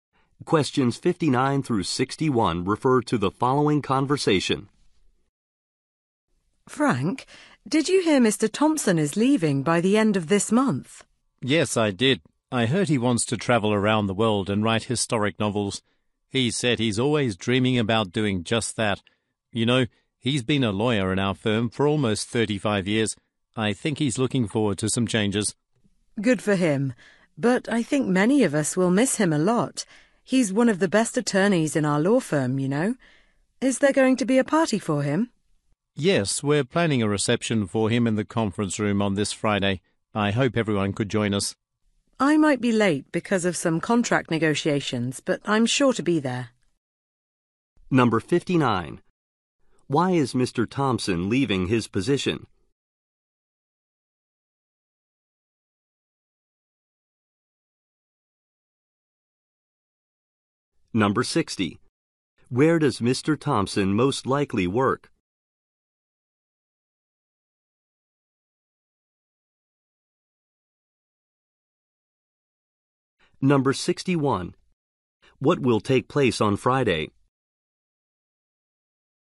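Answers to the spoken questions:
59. To travel and write historical novels
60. At a law firm
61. A farewell reception for Mr. Thompson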